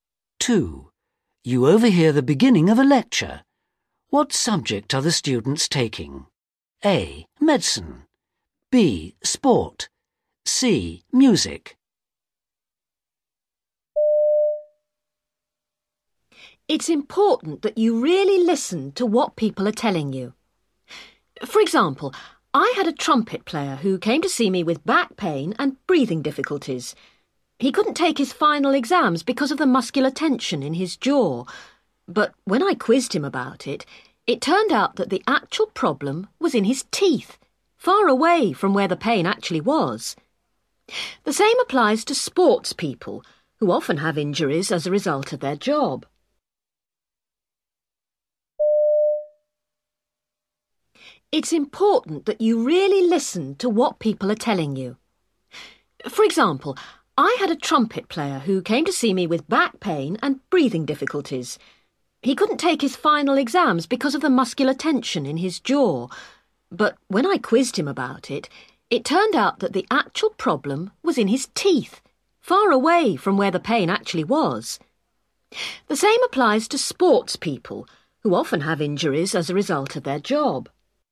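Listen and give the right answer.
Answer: A: Medicine.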